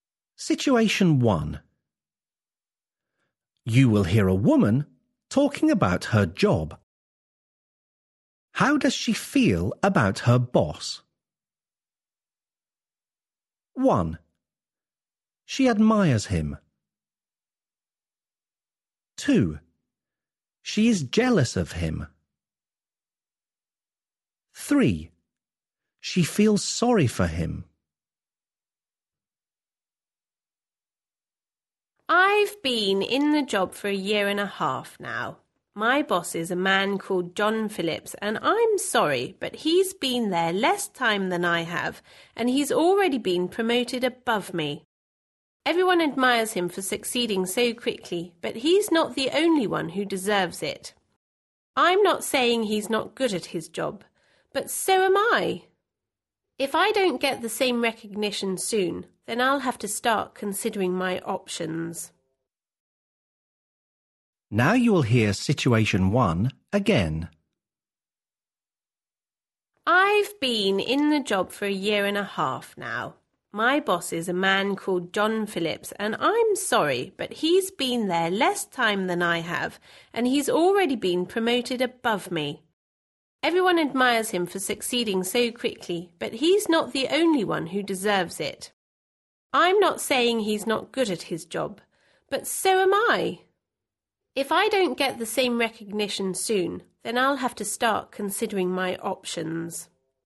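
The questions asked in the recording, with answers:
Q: How does she feel about her boss?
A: 2: She is jealous of him.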